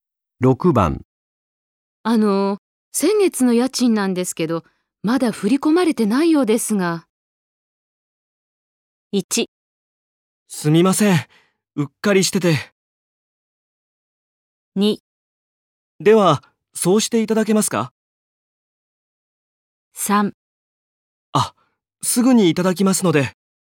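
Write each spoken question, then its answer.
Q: 先月の家賃なんですけど、まだ振り込まれてないようですが。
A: 1: すみません。うっかりしてて。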